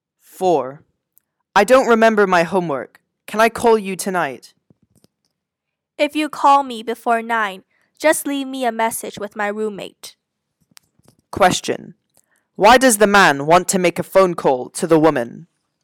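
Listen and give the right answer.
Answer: To ask about the homework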